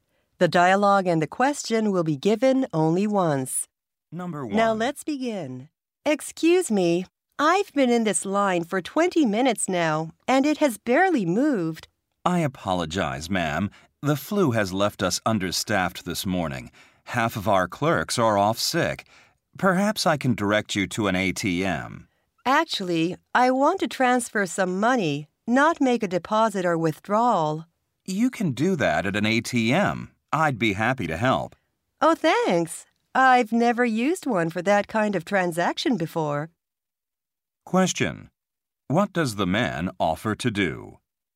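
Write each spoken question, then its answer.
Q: What does the man offer to do?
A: Help her transfer money using an ATM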